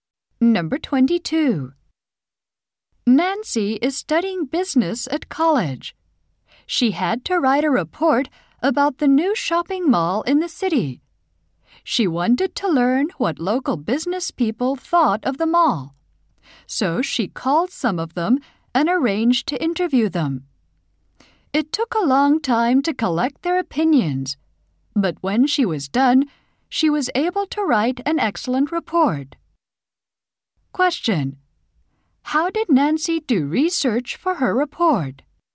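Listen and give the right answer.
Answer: She interviewed local business people.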